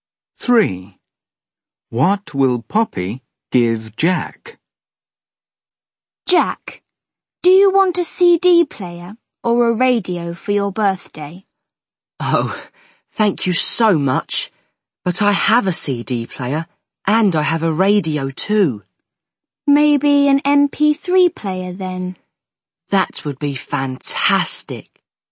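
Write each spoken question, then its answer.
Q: What will Poppy give Jack?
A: an MP3 player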